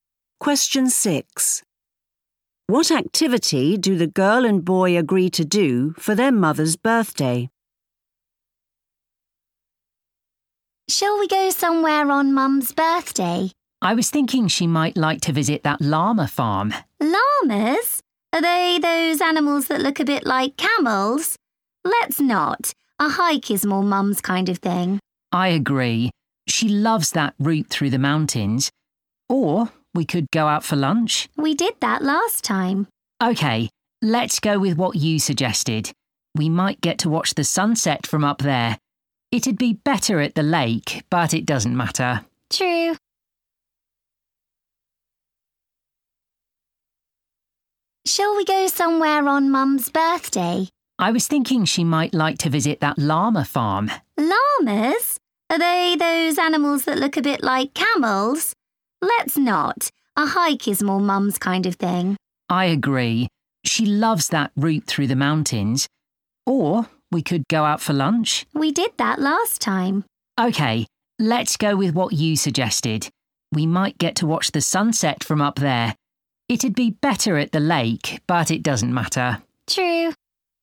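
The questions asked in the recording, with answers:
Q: What activity do the girl and boy agree to do for their mother's birthday?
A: A hike in the mountains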